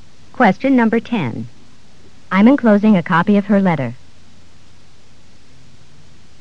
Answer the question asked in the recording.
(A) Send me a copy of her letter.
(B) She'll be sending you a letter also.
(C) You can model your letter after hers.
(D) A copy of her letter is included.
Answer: (D) A copy of her letter is included.

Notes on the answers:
I'm enclosing a copy of her letter.